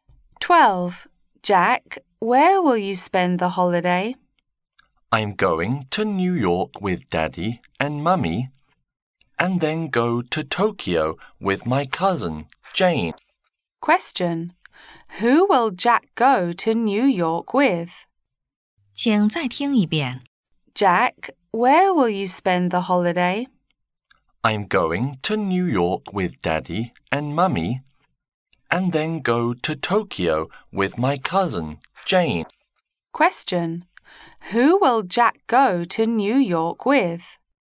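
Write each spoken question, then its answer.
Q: Who will Jack go to New York with?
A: His father and mother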